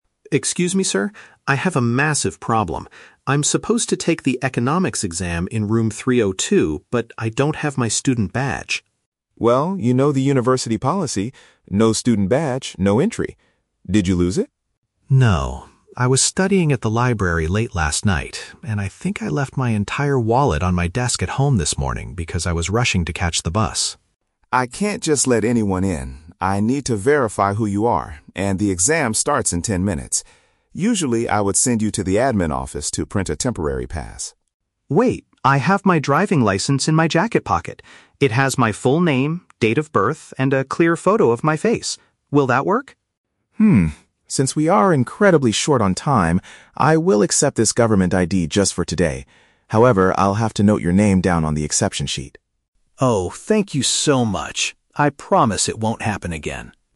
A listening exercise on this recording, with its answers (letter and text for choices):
Listen to the conversation between a university student and an exam invigilator outside an exam hall. Read the questions below and choose the correct answer (A, B, or C) for each.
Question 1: What is the real reason the student does not have his identification card?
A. He accidentally dropped it while studying in the library last night.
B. He left his wallet at his house because he was in a rush this morning.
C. His backpack was stolen on his way to the university campus.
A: B. He left his wallet at his house because he was in a rush this morning.

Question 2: What alternative document does the student offer to prove his identity?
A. A temporary permission slip printed by the administration office.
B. A health insurance card that contains his birth date.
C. An official government card that allows him to operate a vehicle.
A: C. An official government card that allows him to operate a vehicle.

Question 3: What will happen next before the student can enter the room?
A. The staff member will record his personal details on a special list.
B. He will have to stand outside and wait for another ten minutes.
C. He must call his parents to bring the missing document to him.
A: A. The staff member will record his personal details on a special list.

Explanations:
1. The student says, "I left my entire wallet on my desk at home this morning because I was rushing." (Paraphrased: rushing = in a rush; at home = at his house). The Trap: Option (A) is incorrect. The student mentions "studying at the library late last night" (Trap), but he didn't drop it there; he left it at home. Not mentioned: Option (C) is a plausible excuse for not having an ID, but a stolen backpack is never mentioned.
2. The student offers his "driving license," which the invigilator later refers to as a "government ID." (Paraphrased: driving license = card that allows him to operate a vehicle). The Trap: Option (A) is a trap. The invigilator mentions a "temporary pass from the admin office", but says that is what he would usually do, not what the student is offering right now. Not mentioned: Option (B) is a trap. The student mentions his "date of birth", but the card is a driving license, not a health insurance card.
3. The invigilator says, "I'll have to note your name down on the exception sheet." (Paraphrased: note your name down =

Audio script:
Student: Excuse me, sir? I have a massive problem. I'm supposed to take the Economics exam in room 302, but I don't have my student badge.
Invigilator: Well, you know the university policy. No student badge, no entry. Did you lose it?
Student: No. I was studying at the library late last night, and I think I left my entire wallet on my desk at home this morning because I was rushing to catch the bus.
Invigilator: I can't just let anyone in. I need to verify who you are, and the exam starts in ten minutes. Usually, I would send you to the admin office to print a temporary pass.
Student: Wait! I have my driving license in my jacket pocket. It has my full name, date of birth, and a clear photo of my face. Will that work?
Since we are incredibly short on time, I will accept this government ID just for today. However, I'll have to note your name down on the exception sheet.